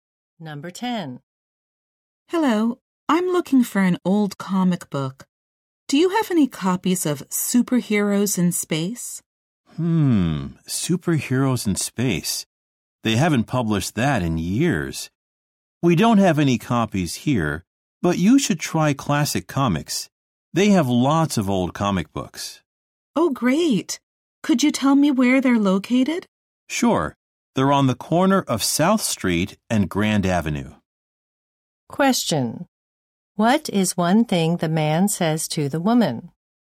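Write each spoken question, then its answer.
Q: What is one thing the man says to the woman?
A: She should try Classic Comics, which has lots of old comic books.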